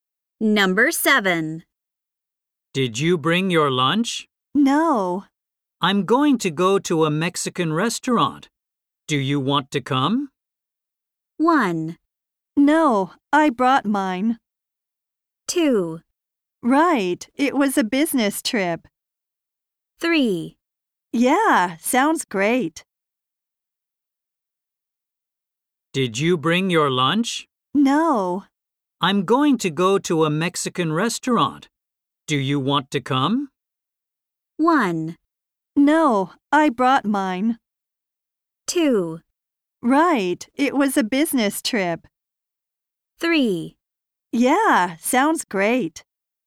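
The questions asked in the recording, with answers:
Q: Do you want to come?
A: 3: Yeah, sounds great.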